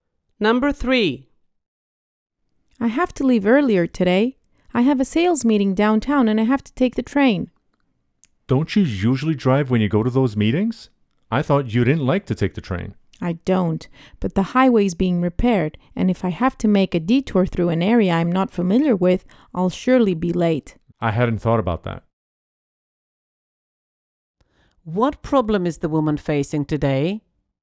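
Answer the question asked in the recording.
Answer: The highway is being repaired, so she must take the train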